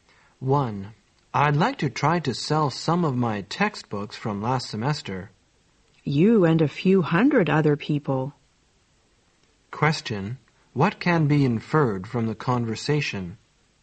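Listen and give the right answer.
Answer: Many people are trying to sell their old textbooks.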